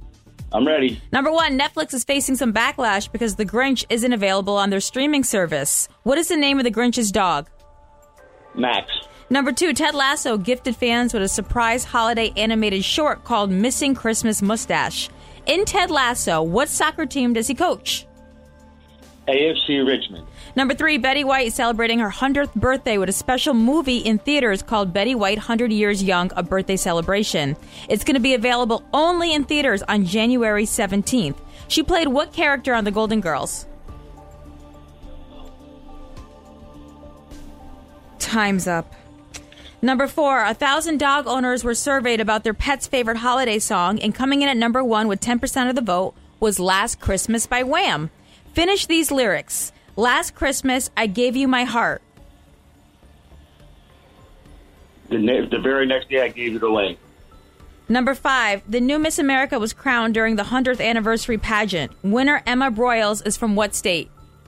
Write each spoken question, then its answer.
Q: What is the name of The Grinch's dog?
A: Max.

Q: In Ted Lasso, what soccer team does he coach?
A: AFC Richmond.